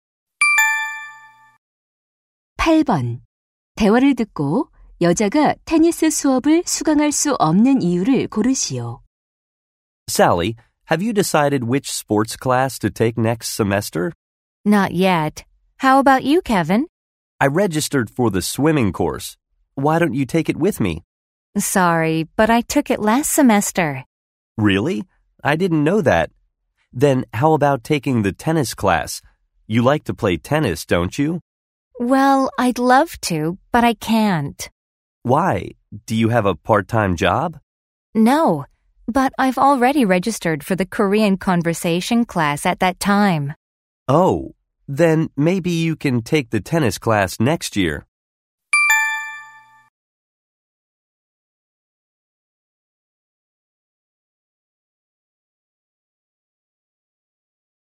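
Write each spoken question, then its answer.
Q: 대화를 듣고 여자가 테니스 수업을 수강할 수 없는 이유를 고르시오.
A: 같은 시간에 한국어 회화 수업을 이미 신청해서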